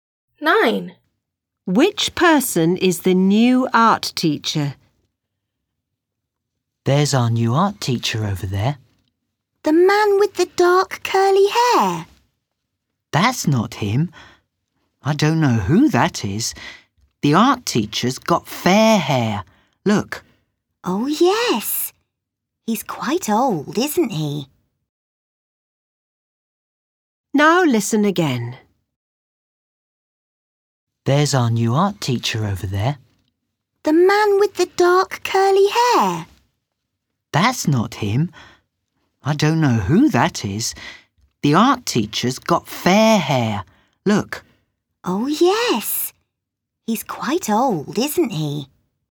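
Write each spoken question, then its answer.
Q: Which person is the new art teacher?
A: The quite old man with fair hair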